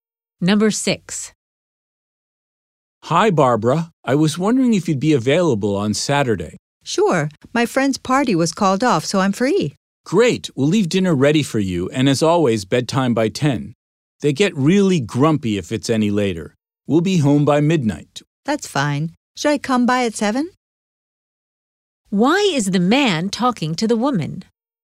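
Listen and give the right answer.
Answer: To arrange babysitting on Saturday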